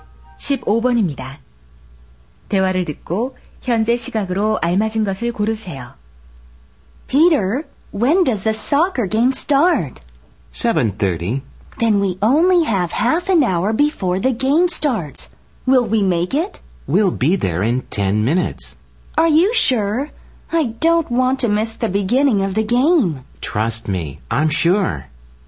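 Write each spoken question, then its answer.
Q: 대화를 듣고 현재 시각으로 알맞은 것을 고르세요.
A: 7시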